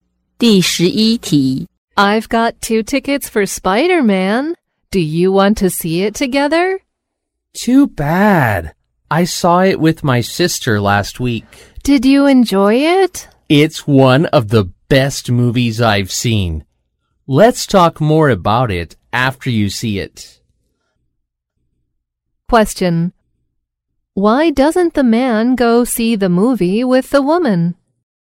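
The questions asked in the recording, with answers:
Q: Why doesn't the man go see the movie with the woman?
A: He already saw it with his sister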